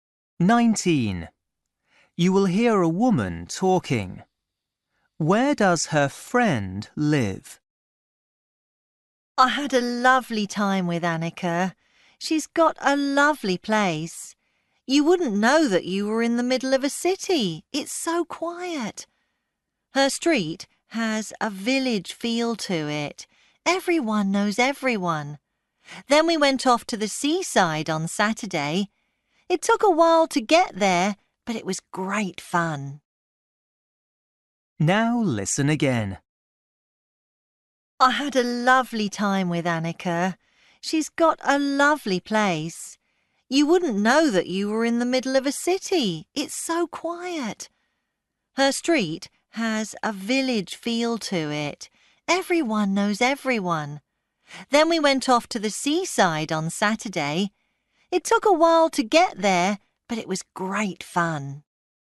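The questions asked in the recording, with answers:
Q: Where does her friend live?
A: In a quiet street in the middle of a city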